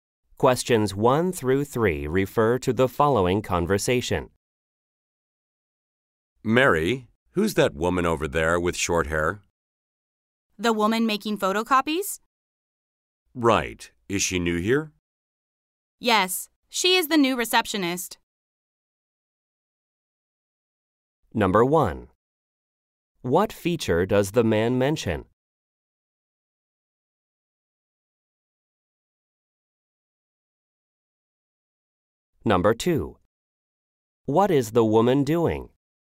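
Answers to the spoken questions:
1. Short hair
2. Making photocopies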